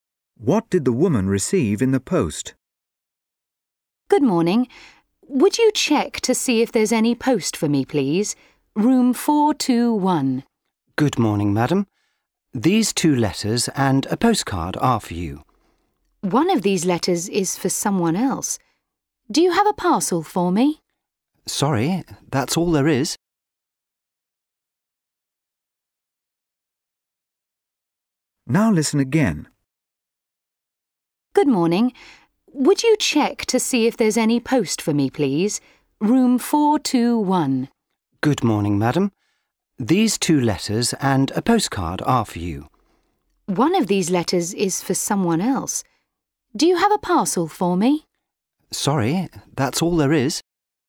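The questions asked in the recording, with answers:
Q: What did the woman receive in the post?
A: A letter and a postcard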